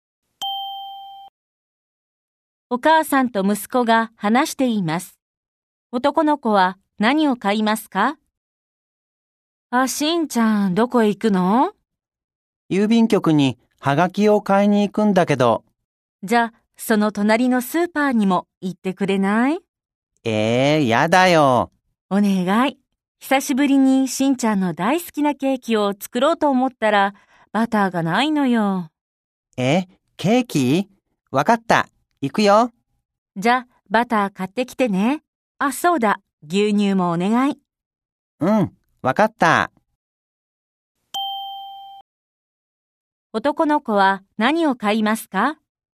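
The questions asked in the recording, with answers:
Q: 男の子は何を買いますか?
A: はがきとバターと牛乳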